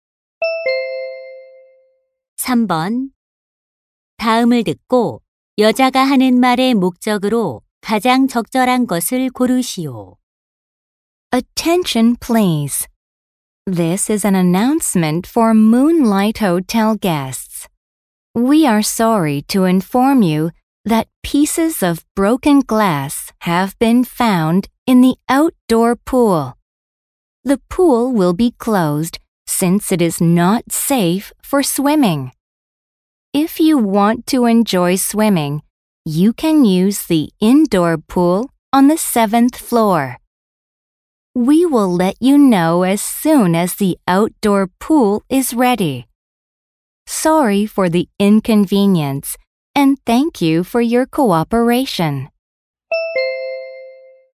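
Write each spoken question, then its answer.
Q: 다음을 듣고 여자가 하는 말의 목적으로 가장 적절한 것을 고르시오.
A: 야외 수영장 폐쇄를 안내하려고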